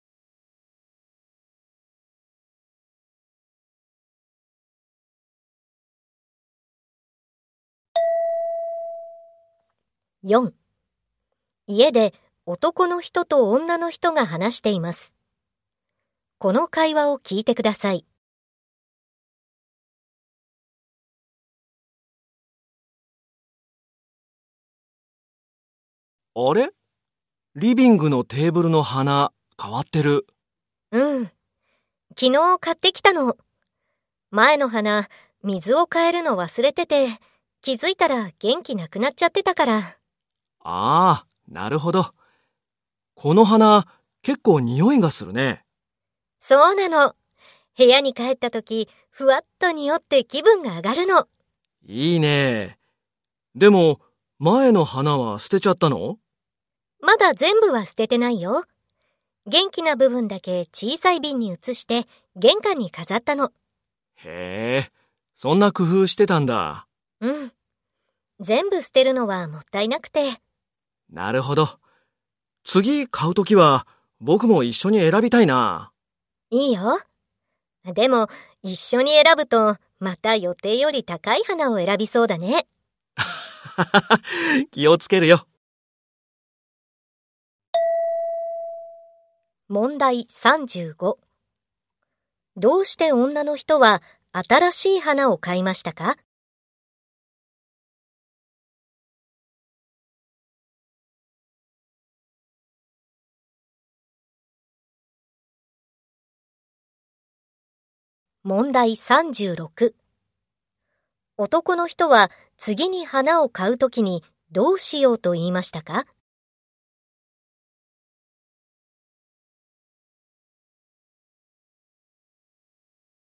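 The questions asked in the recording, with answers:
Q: どうして女の人は新しい花を買いましたか?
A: 水を変えるのを忘れて前の花が元気がなくなったから

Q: 男の人は次に花を買うときにどうしようと言いましたか?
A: 一緒に選びたい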